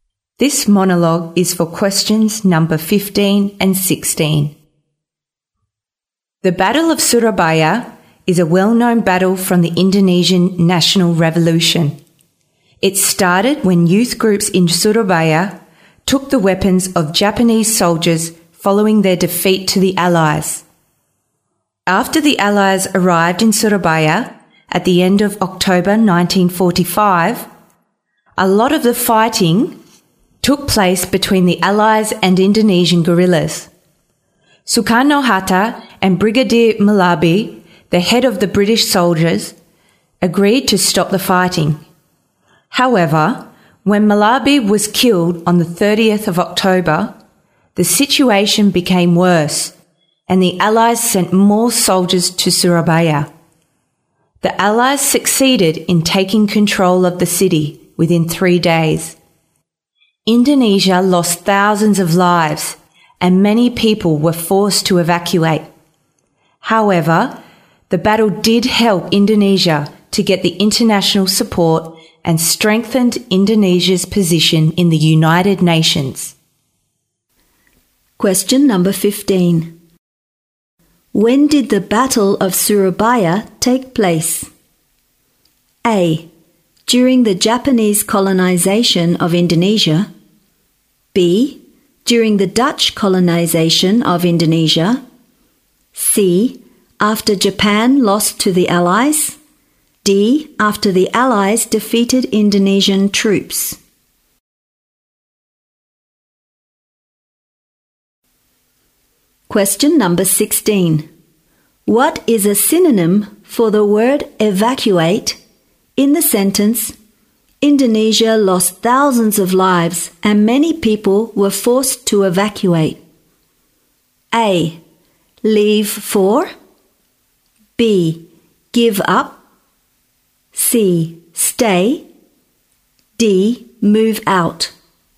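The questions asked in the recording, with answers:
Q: When did the Battle of Surabaya take place?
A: C: After Japan lost to the Allies.

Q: What is a synonym for the word evacuate in the sentence, Indonesia lost thousands of lives and many people were forced to evacuate?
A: D: Move out.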